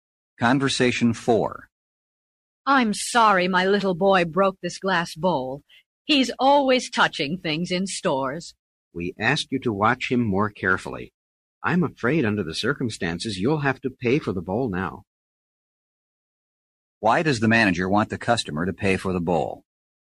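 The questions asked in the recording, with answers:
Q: Why does the manager want the customer to pay for the bowl?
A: Her little boy broke it.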